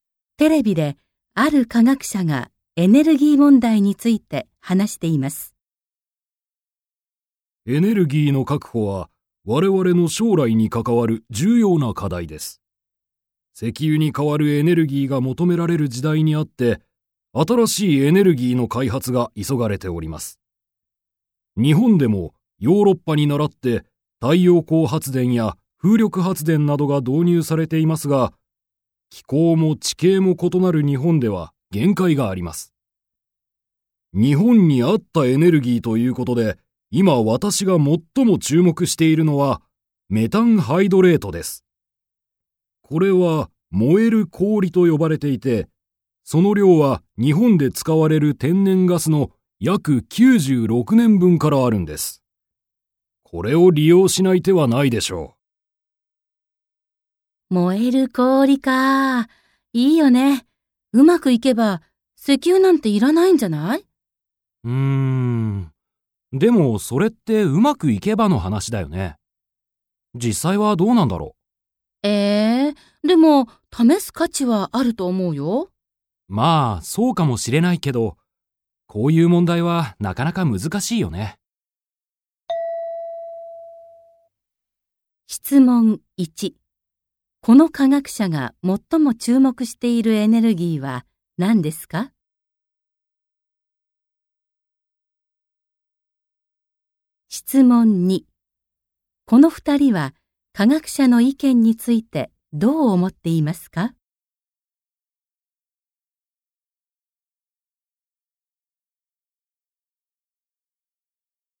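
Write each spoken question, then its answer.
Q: この科学者が最も注目しているエネルギーは何ですか?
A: メタンハイドレート(燃える氷)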